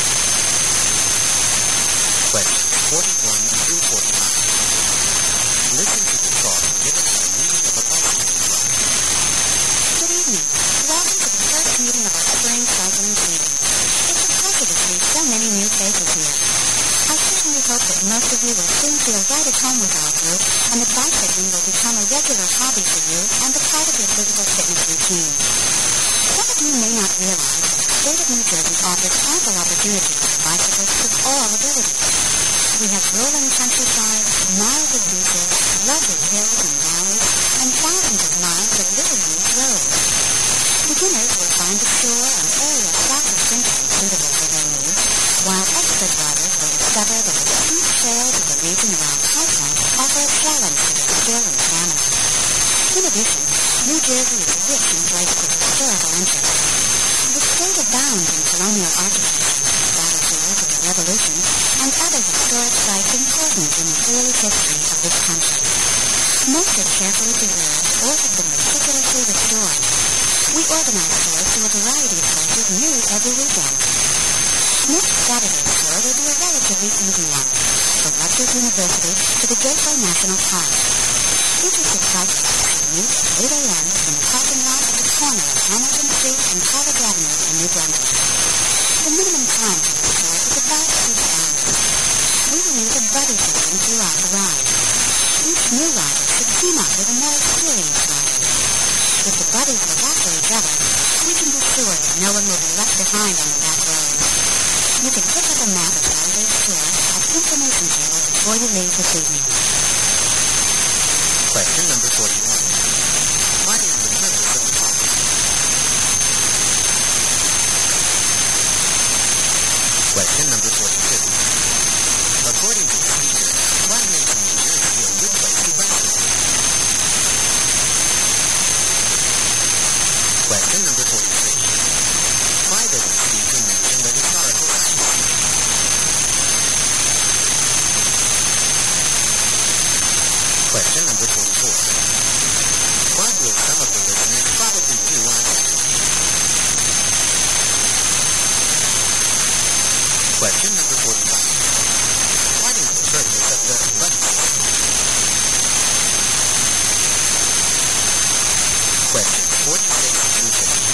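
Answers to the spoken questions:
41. To welcome new members and introduce the club's spring cycling season
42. Its varied terrain and many little-used roads
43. To show there are many interesting historic places to visit on tours
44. Ride on a tour from Rutgers University to Gateway National Park
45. To make sure no one gets left behind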